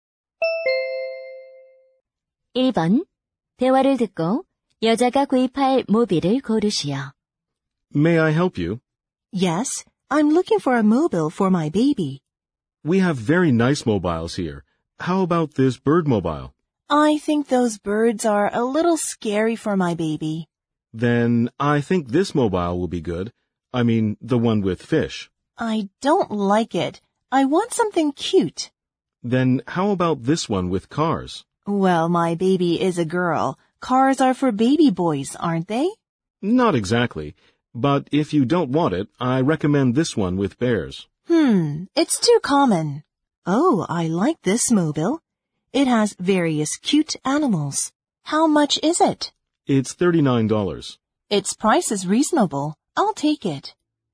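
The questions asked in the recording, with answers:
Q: 대화를 듣고 여자가 구입할 모빌을 고르시오.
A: 여러 귀여운 동물들이 있는 모빌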